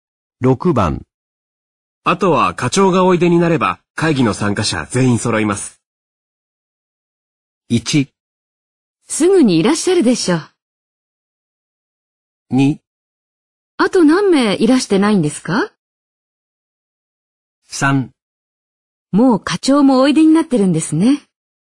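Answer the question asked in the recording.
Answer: 1: すぐにいらっしゃるでしょう。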